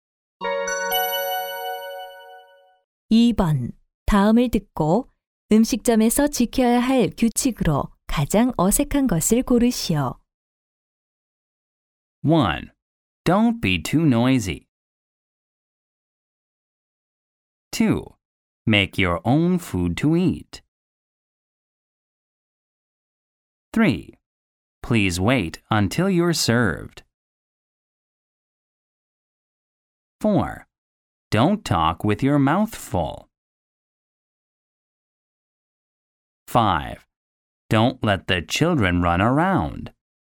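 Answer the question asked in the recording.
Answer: 2: Make your own food to eat.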